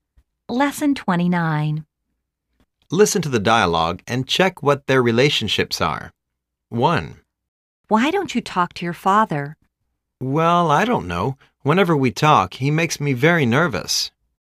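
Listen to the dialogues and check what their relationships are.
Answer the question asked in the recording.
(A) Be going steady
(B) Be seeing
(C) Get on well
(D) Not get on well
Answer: (D) Not get on well

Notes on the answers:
A:Why don't you talk to your father? B:Well,I don't know. Whenever we talk, he makes me very nervous...

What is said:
A:Why don't you talk to your father?
B:Well,I don't know. Whenever we talk, he makes me very nervous...
A:How long have you been dating with Julia?
B:She has become my girlfriend for more than 10 years.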